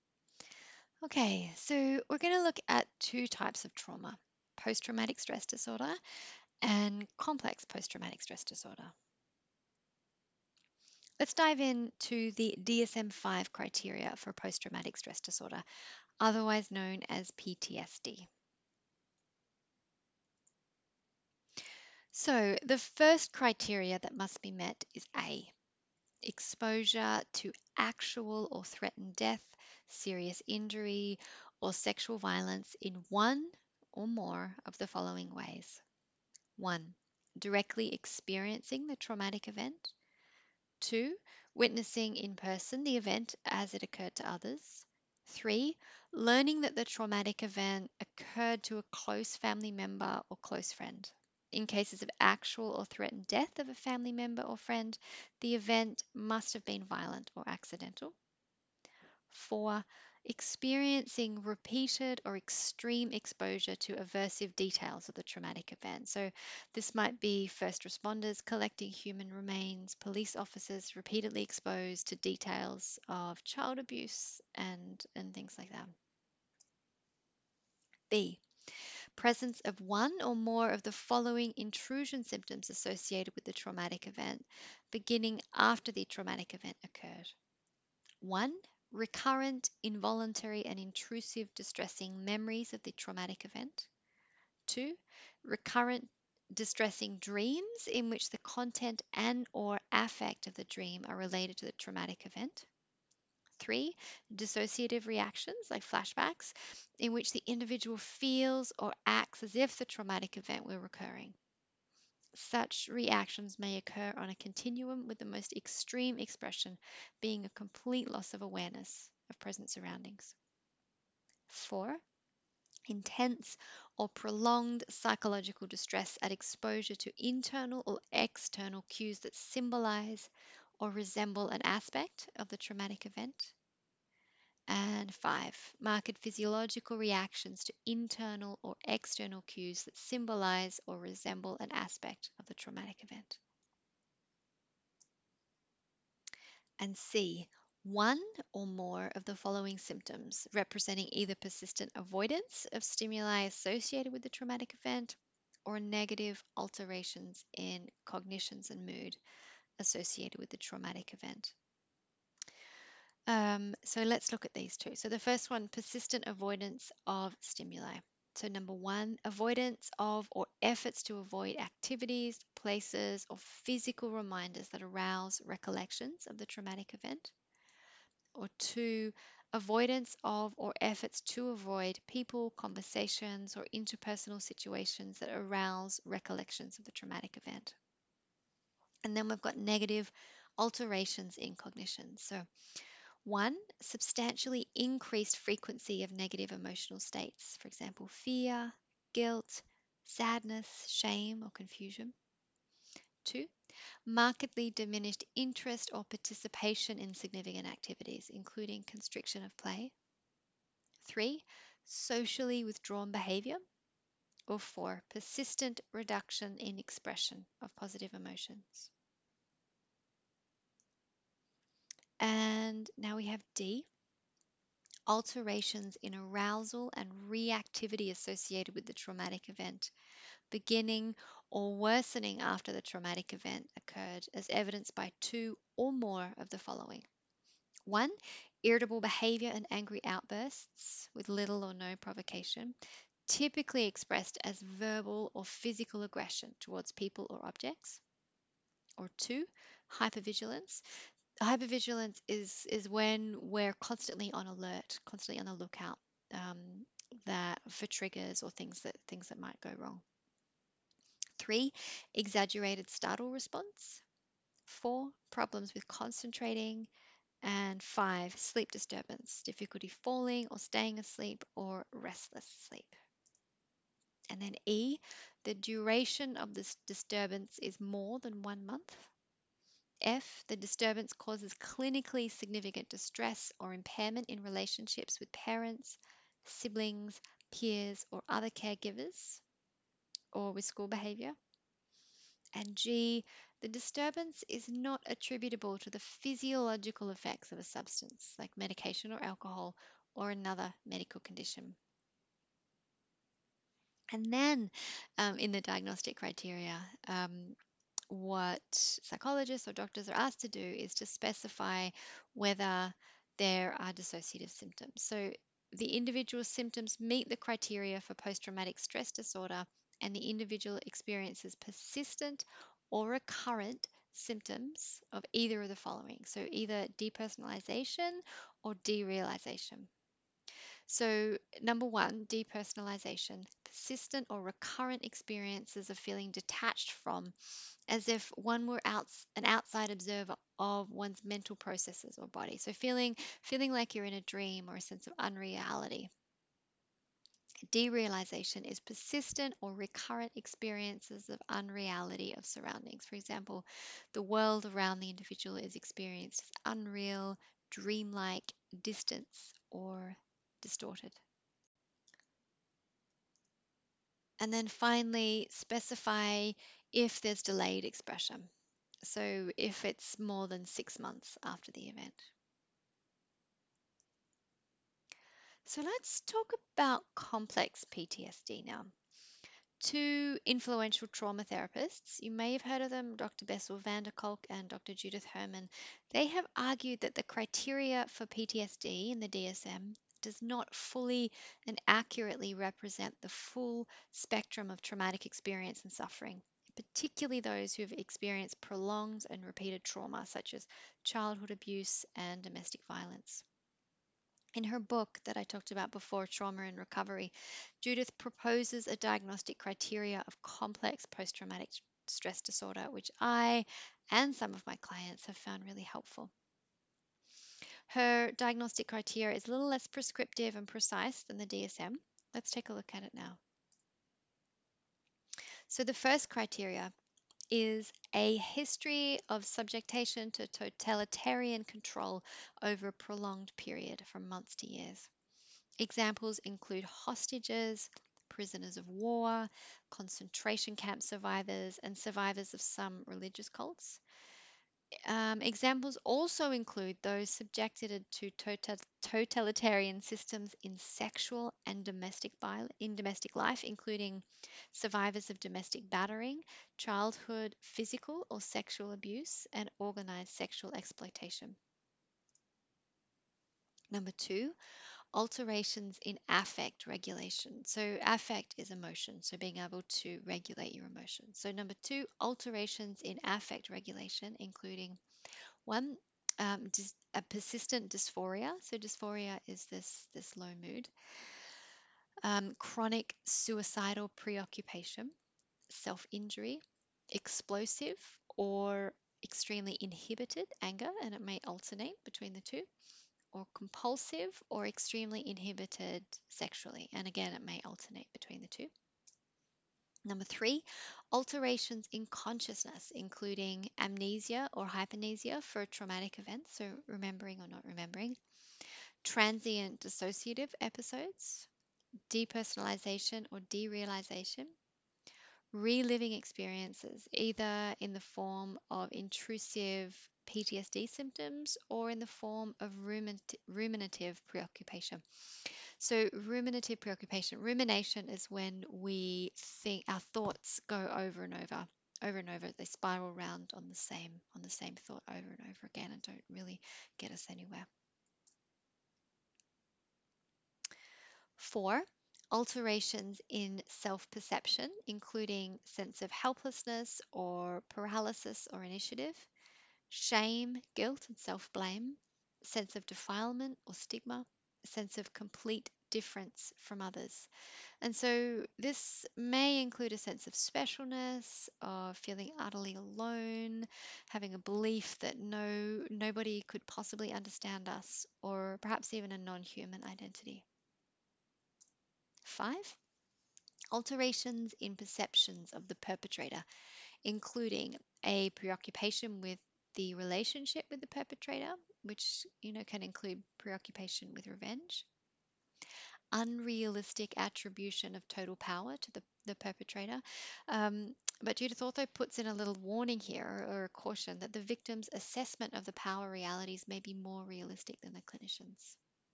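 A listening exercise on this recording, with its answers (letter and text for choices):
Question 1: A student tells you that they were diagnosed with Posttraumatic Stress Disorder by their Psychiatrist. This might mean that the student:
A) Is probably going crazy and should be avoided at all costs.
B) Has been exposed to a traumatic event and feels distressed as a result.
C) Isn't resilient enough to deal with ordinary life challenges.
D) All of the above.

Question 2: What are the symptoms of dissociation?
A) Depersonalisation (feeling detached from or feeling like an observer of your own life) and derealisation (experiencing of unreality of your surroundings).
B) Depersonalisation (taking everything personally) and derealisation (experiencing of unreality of your surroundings).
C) Feeling like you're God.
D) Lucid dreaming.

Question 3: Complex PTSD is a diagnosis given when an individual:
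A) Has had a single traumatic incident.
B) Has a complex personality.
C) Has experienced repeated trauma over a prolonged period of time.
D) Is a perpetrator of abuse.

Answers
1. B) Has been exposed to a traumatic event and feels distressed as a result.
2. A) Depersonalisation (feeling detached from or feeling like an observer of your own life) and derealisation (experiencing of unreality of your surroundings).
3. C) Has experienced repeated trauma over a prolonged period of time.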